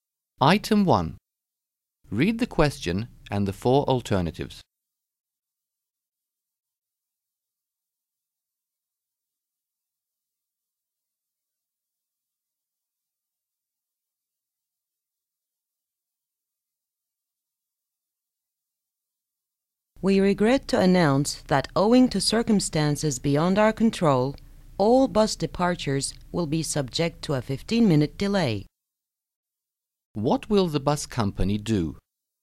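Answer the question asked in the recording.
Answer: Delay all bus departures by 15 minutes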